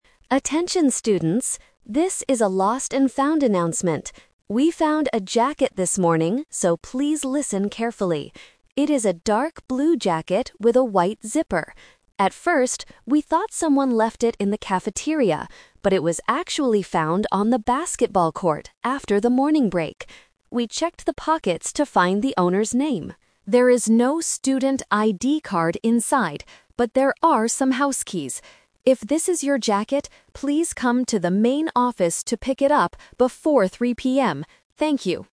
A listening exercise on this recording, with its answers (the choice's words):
Listen to a "lost and found" announcement from a school office staff member, then choose the best answer (A, B, or C) for each question below.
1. Where was the jacket found?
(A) In the cafeteria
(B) On the basketball court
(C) In the main office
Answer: On the basketball court

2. What is inside the jacket's pocket?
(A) A student ID card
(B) Some money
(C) Some keys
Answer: Some keys

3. What should the owner of the jacket do?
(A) Go to the main office before 3:00 PM.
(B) Go to the basketball court right now.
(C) Call the main office before 3:00 PM.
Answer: Go to the main office before 3:00 PM.

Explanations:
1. The announcer clearly states, "...it was actually found on the basketball court after the morning break." Why the traps are wrong: Option (A) is "The Twist Trap". The announcer says they thought it was in the cafeteria at first, but it wasn't. Option (C) is where the student needs to go to get the jacket, not where it was found.
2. The announcer checks the pockets and says, "...there are some house keys." Why the traps are wrong: Option (A) is "The Trap". A student ID card is mentioned, but the announcer explicitly says there is "no student ID card inside." Option (B) is a plausible item to find in a pocket, but it is never mentioned.
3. The instruction at the end is clear: "...please come to the main office to pick it up before 3:00 PM." Why the traps are wrong: Option (B) uses the correct location of where the jacket was lost, but not where the student should go now. Option (C) is a "Verb Trap"; the student needs to come to the office, not call them.

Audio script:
Office Worker: Attention, students. This is a lost and found announcement. We found a jacket this morning, so please listen carefully. It is a dark blue jacket with a white zipper. At first, we thought someone left it in the cafeteria, but it was actually found on the basketball court after the morning break. We checked the pockets to find the owner's name. There is no student ID card inside, but there are some house keys. If this is your jacket, please come to the main office to pick it up before 3:00 PM. Thank you.